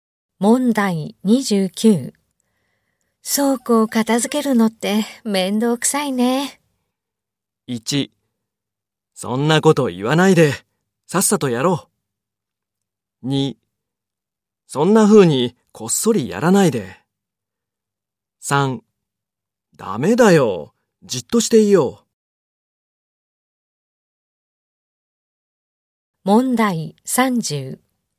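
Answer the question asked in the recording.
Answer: 1: そんなこと言わないでさっさとやろう。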